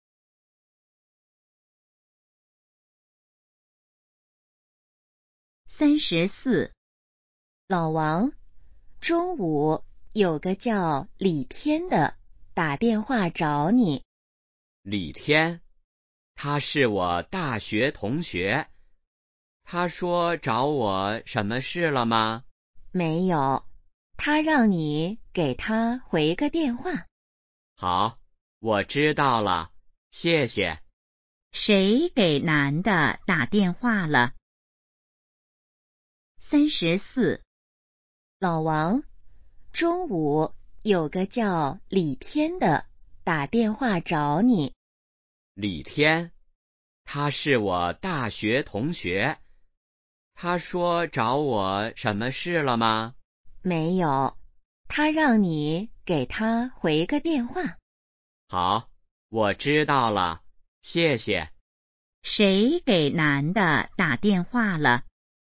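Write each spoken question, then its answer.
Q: 谁给男的打电话了?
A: 李天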